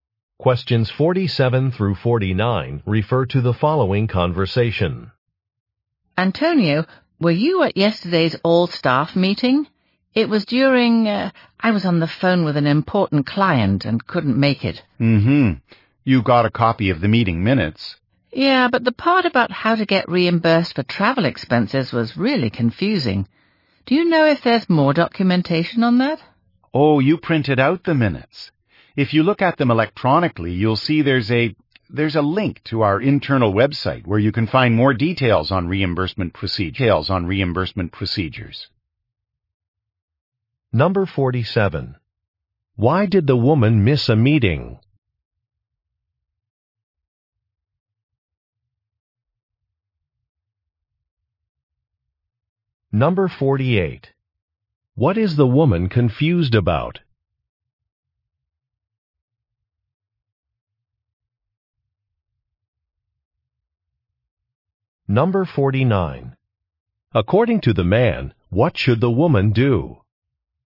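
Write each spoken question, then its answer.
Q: Why did the woman miss a meeting?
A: She was on the phone with an important client

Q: What is the woman confused about?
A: How to get reimbursed for travel expenses

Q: According to the man, what should the woman do?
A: Look at the minutes electronically and use the link to the internal website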